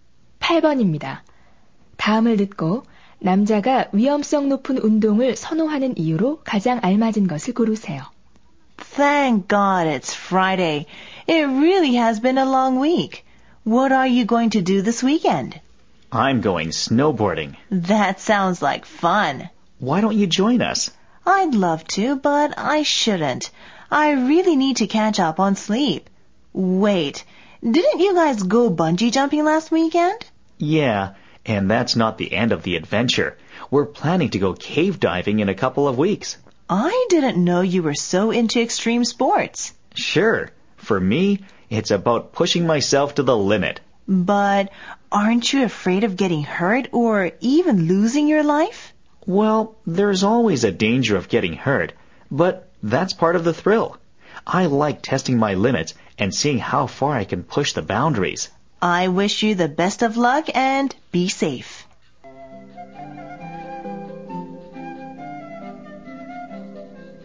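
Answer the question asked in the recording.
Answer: 자신의 한계를 시험해 보고 싶어서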